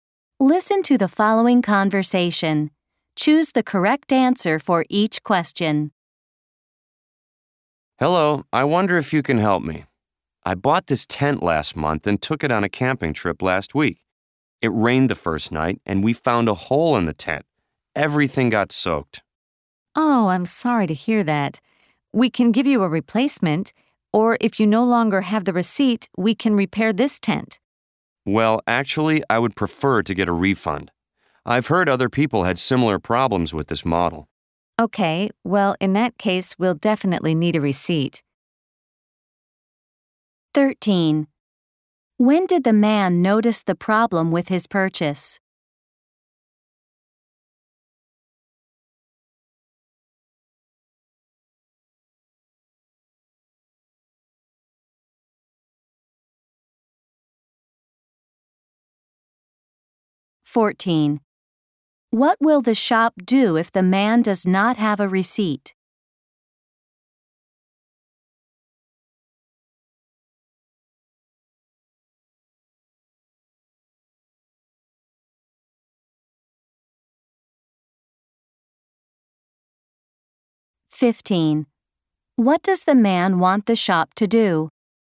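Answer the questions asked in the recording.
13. On the first night of his camping trip last week, when it rained
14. Repair the tent
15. Give him a refund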